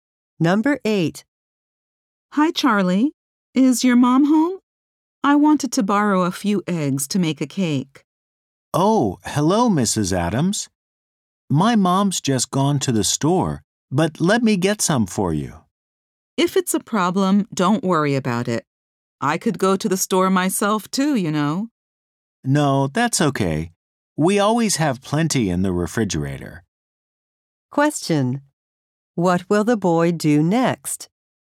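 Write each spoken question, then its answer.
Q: What will the boy do next?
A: Get some eggs for Mrs. Adams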